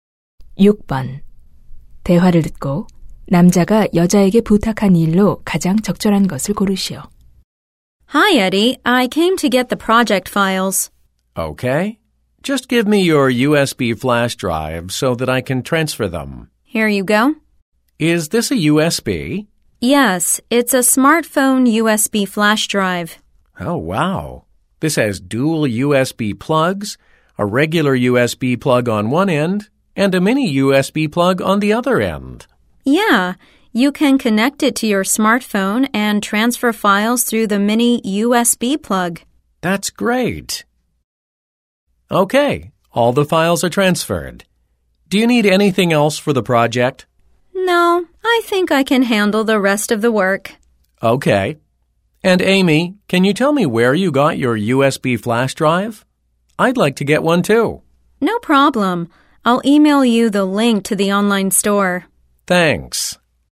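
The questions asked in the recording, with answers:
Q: 대화를 듣고 남자가 여자에게 부탁한 일로 가장 적절한 것을 고르시오.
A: USB 구입처(온라인 상점 링크) 알려 주기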